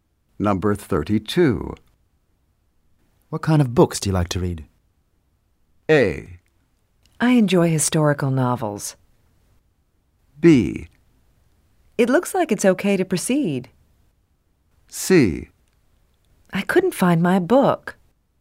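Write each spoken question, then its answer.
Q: What kind of books do you like to read?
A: A: I enjoy historical novels.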